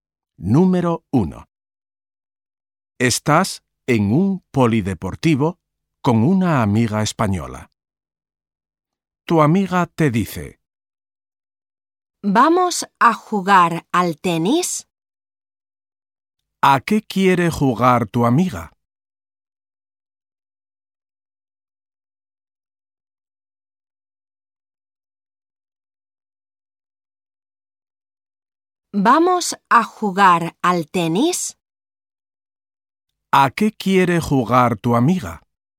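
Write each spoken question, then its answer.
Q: ¿A qué quiere jugar tu amiga?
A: Al tenis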